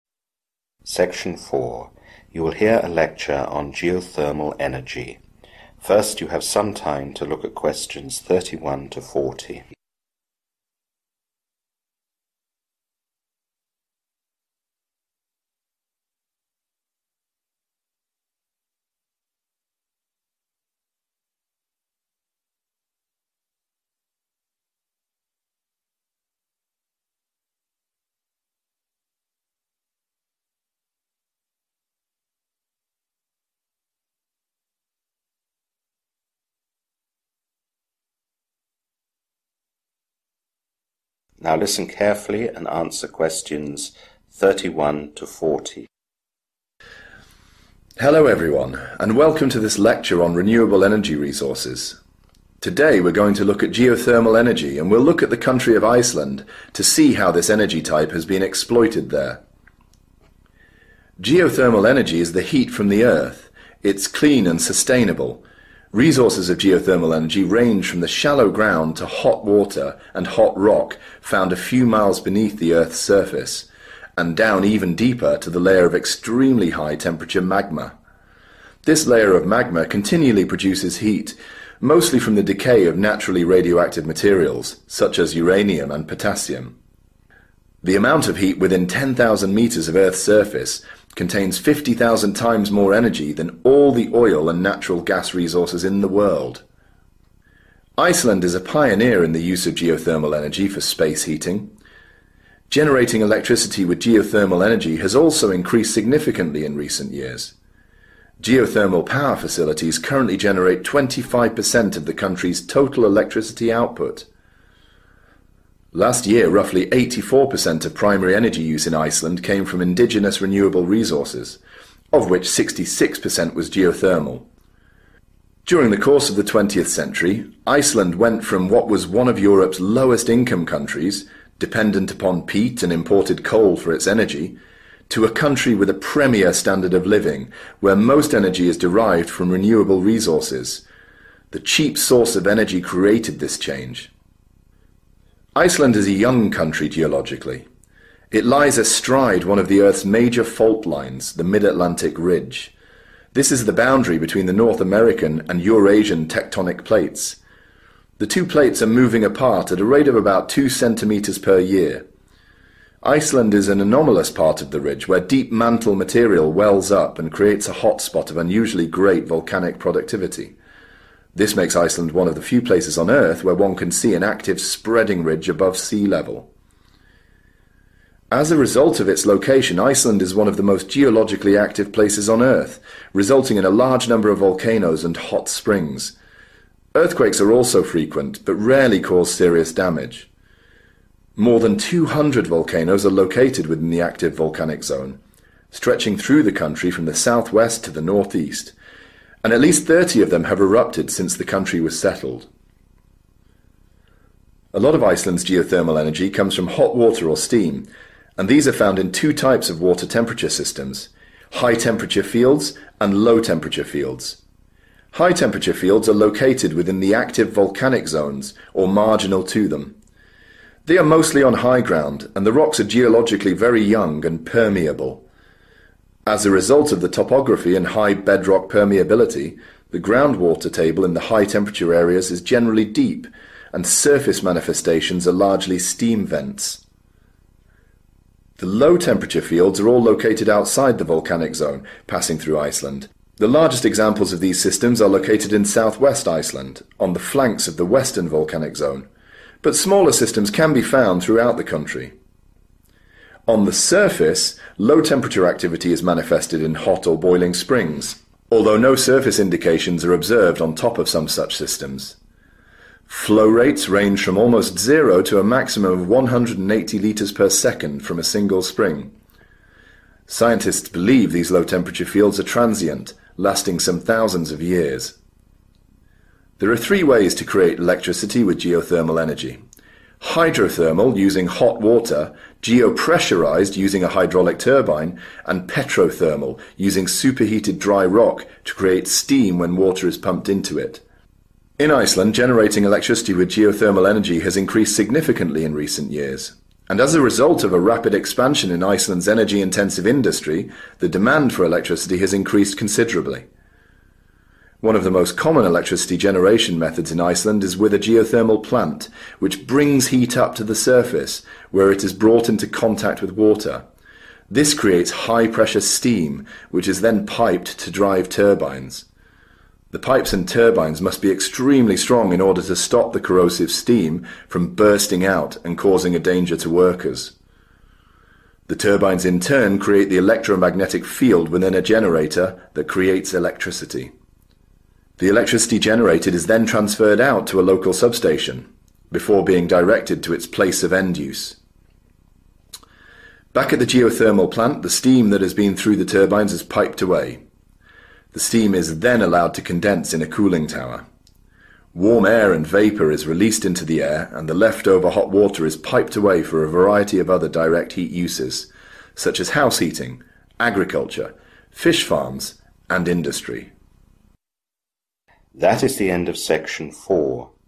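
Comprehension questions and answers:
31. Most of the energy comes from the (31) _________ of radioactive minerals (ie: uranium and potassium)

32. In the 20th century, Iceland changed from a poor country to one with a high (32) _________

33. The North American and Eurasian tectonic plates move at (33) _________ cm annually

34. Creates a lot of volcanic activity and regular (34) _________ (not usually dangerous)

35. Found in the (35) _________ or nearby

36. Shown at surface usually as (36) _________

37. These fields are thought to be (37) _________ (existing a few thousand years)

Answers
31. decay
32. standard of living
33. 2
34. earthquakes
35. active volcanic zones
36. steam vents
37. transient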